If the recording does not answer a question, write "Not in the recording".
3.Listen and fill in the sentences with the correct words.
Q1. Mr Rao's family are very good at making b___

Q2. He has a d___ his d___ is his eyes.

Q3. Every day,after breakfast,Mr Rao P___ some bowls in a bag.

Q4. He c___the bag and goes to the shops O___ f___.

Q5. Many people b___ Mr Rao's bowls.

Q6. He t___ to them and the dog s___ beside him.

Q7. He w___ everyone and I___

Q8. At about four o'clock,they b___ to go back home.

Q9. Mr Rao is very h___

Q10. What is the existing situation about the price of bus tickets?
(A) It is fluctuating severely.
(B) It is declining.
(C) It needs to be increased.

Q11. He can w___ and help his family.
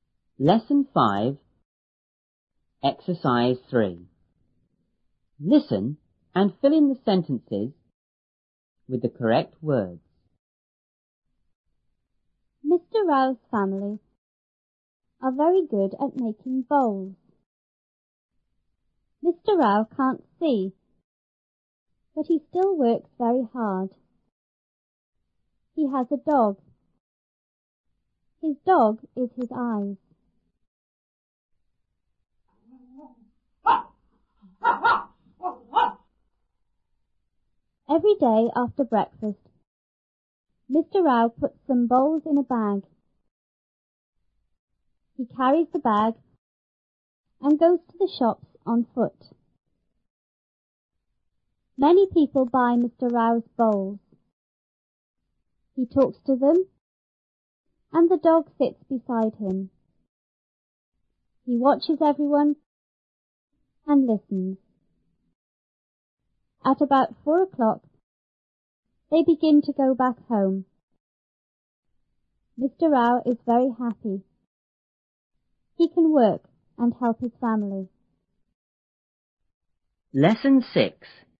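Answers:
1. bowls
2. dog, dog
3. puts
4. carries, on foot
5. buy
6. talks, sits
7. watches, listens
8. begin
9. happy
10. Not in the recording
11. work

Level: 初中英语广州版1B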